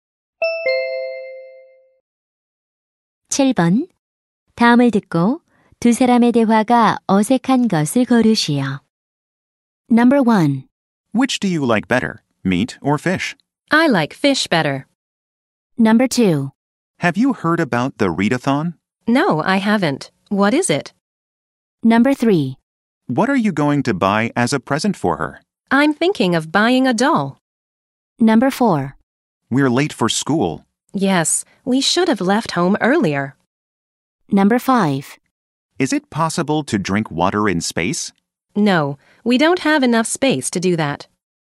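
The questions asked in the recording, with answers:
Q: 다음을 듣고 두 사람의 대화가 어색한 것을 거르시오.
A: 5: Is it possible to drink water in space? / No, we don't have enough space to do that.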